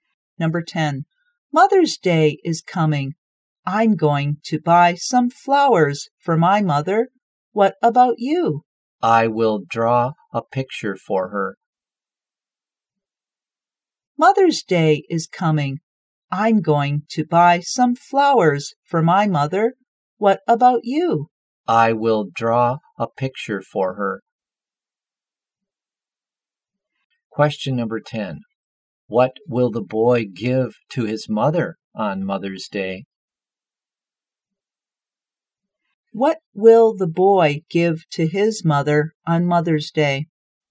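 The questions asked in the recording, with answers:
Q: What will the boy give to his mother on Mother's Day?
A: A picture he draws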